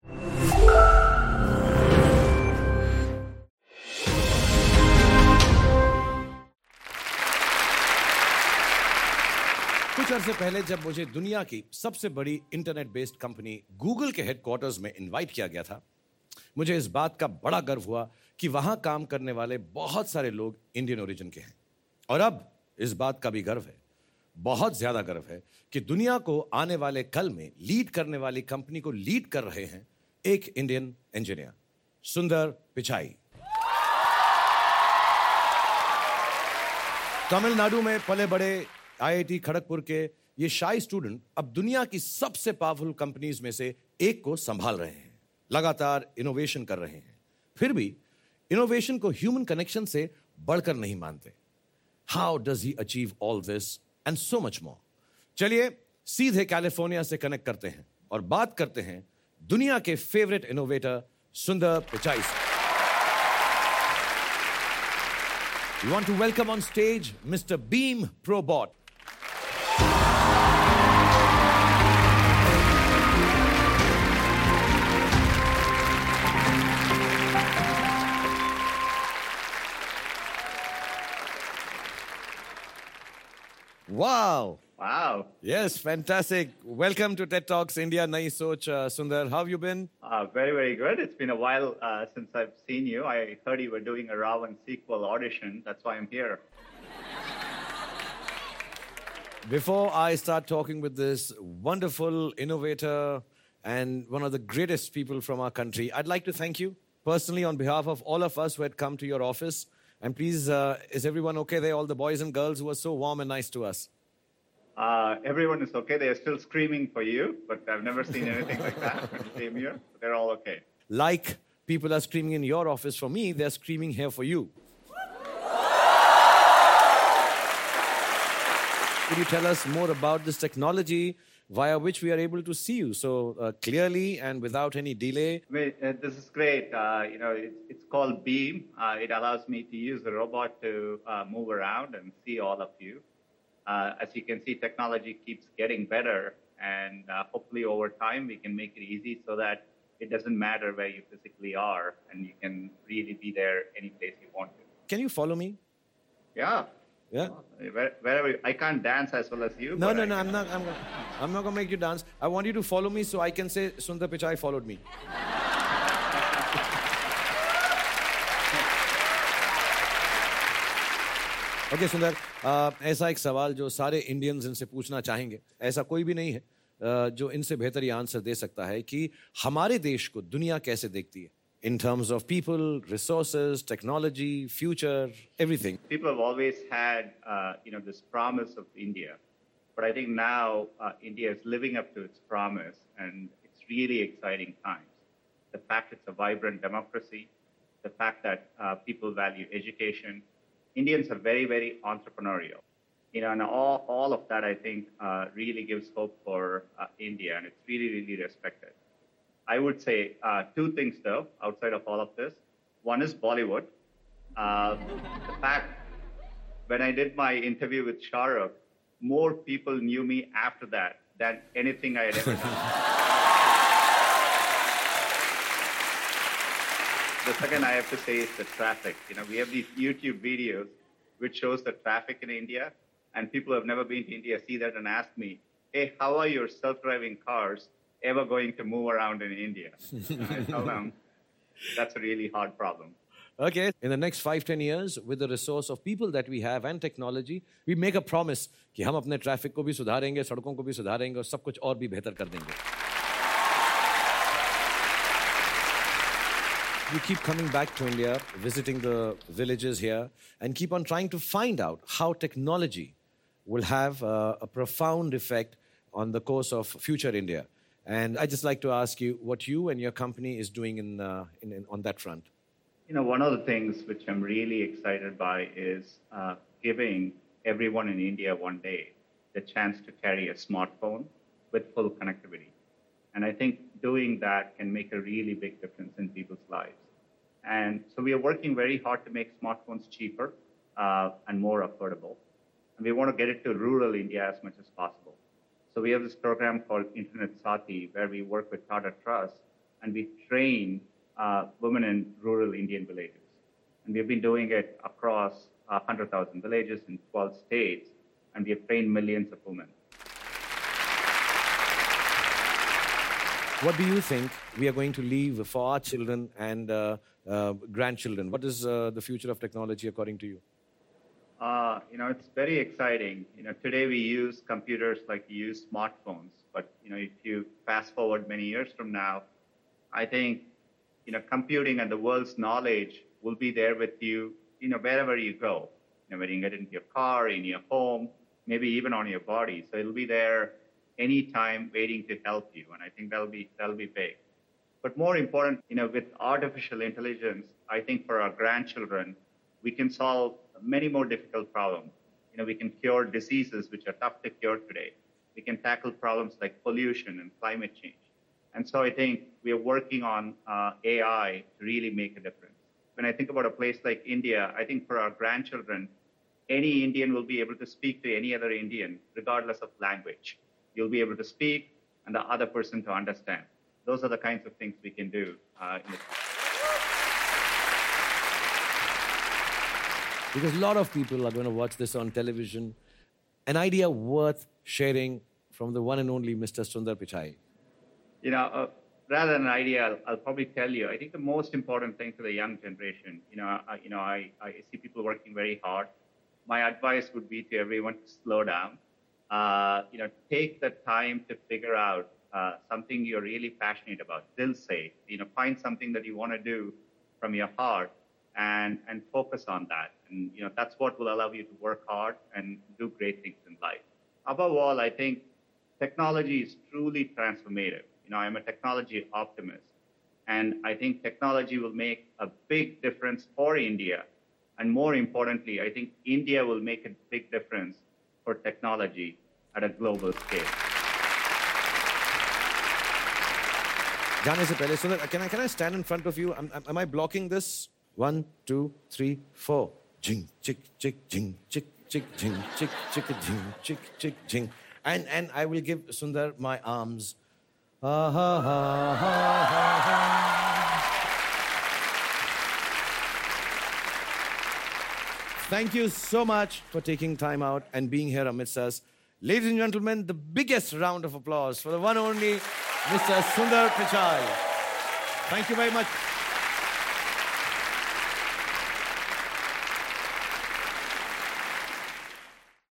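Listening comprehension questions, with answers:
用 1-2 句话用自己的话回答下面的问题。点「✨ AI 判断」后,AI 会对照当天 transcript 给出参考要点与评分。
According to Sundar, what was the name of the program Google ran with Tata Trust to train women in rural Indian villages, and how many villages and states did it cover?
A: Internet Saathi; 100,000 villages in 12 states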